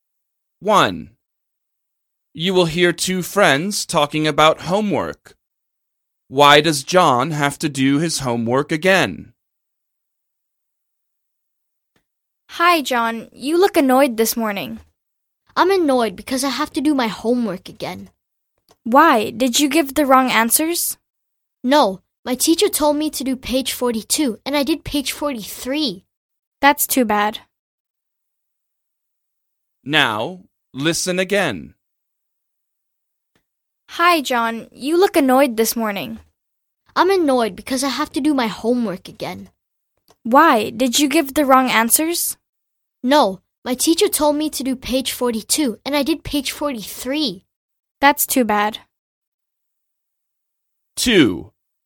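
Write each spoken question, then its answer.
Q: Why does John have to do his homework again?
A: He did the wrong page (43 instead of 42)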